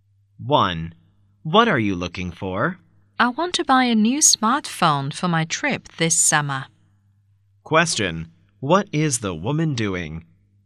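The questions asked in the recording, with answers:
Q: What is the woman doing?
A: Shopping for a new smartphone for her summer trip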